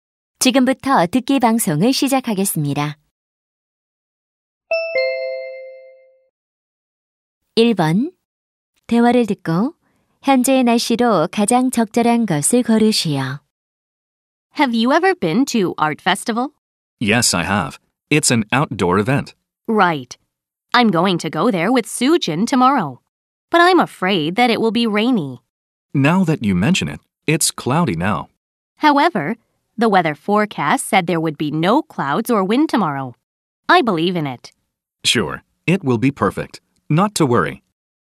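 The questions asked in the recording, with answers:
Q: 대화를 듣고 현재의 날씨로 가장 적절한 것을 고르시오.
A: 흐림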